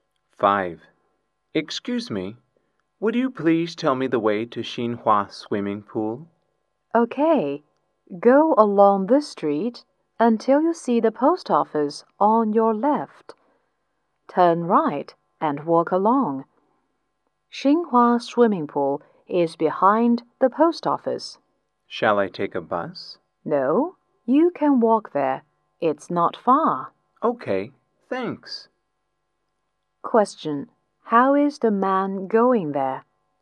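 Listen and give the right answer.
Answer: On foot (he will walk)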